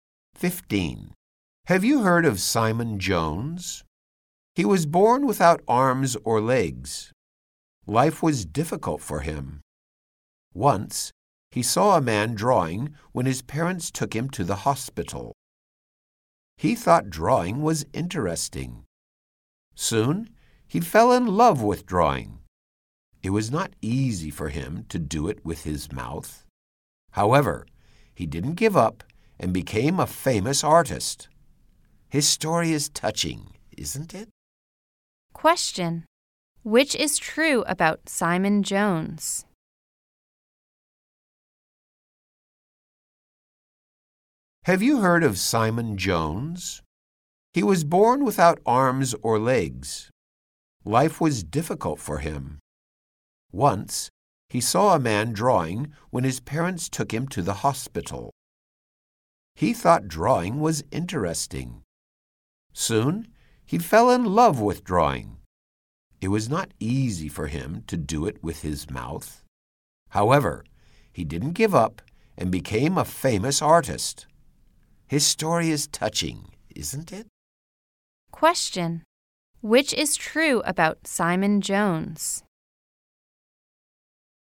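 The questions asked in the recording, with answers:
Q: Question. Which is true about Simon Jones?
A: He was born without arms or legs and became a famous artist who draws with his mouth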